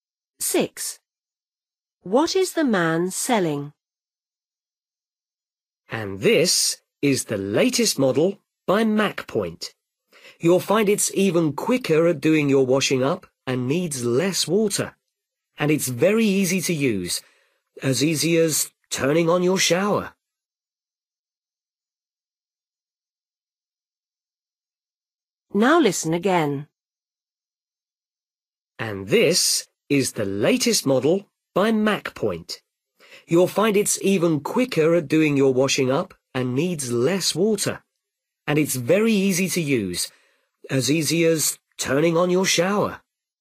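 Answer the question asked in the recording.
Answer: a dishwasher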